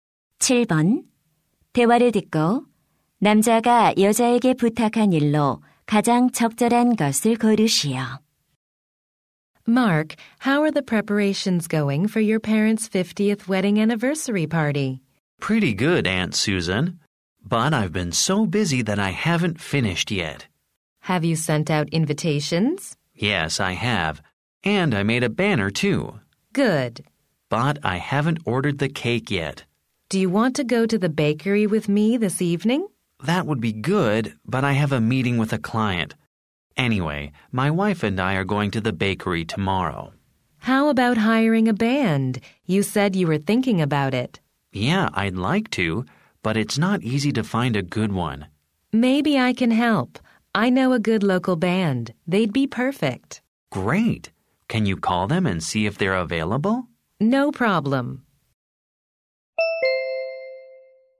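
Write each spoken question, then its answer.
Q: 대화를 듣고 남자가 여자에게 부탁한 일로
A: 밴드에 전화해서 공연 가능한지 알아보기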